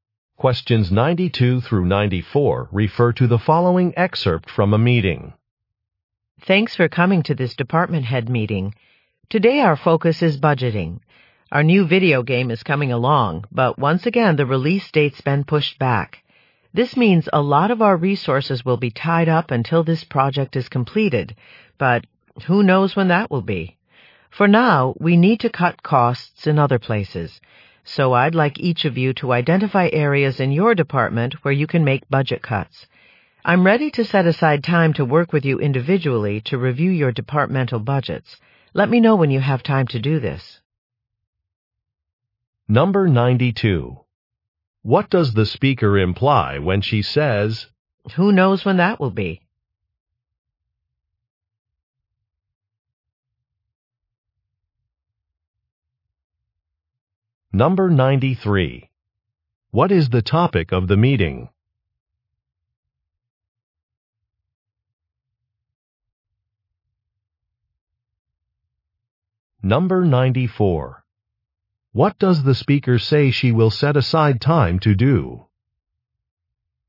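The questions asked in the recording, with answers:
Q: What is the topic of the meeting?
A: Budgeting

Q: What does the speaker say she will set aside time to do?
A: Review departmental budgets with each person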